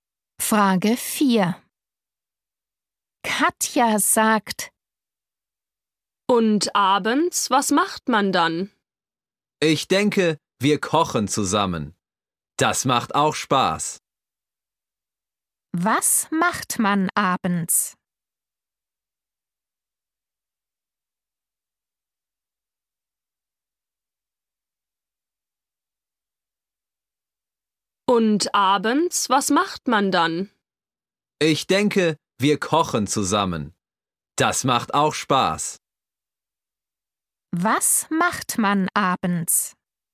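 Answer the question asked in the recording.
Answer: Man kocht zusammen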